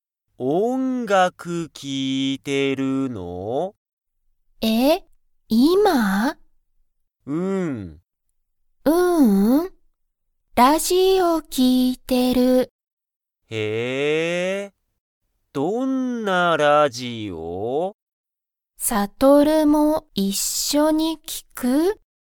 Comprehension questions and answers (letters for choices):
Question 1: ユリは今(いま)、音楽(おんがく)を聴(き)いていますか?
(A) はい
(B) いいえ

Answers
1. B

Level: Level 1